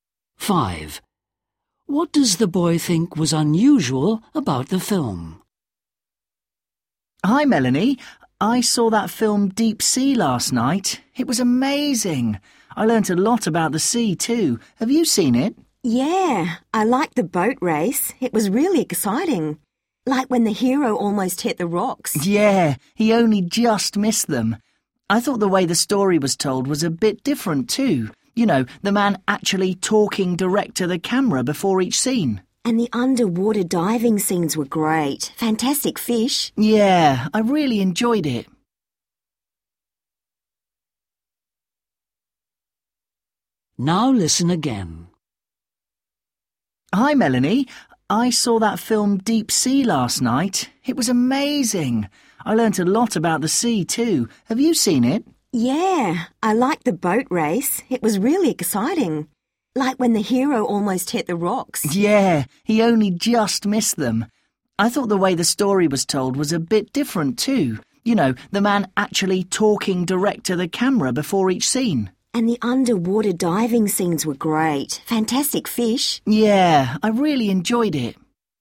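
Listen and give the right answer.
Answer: The way the story was told, with a man talking directly to the camera before each scene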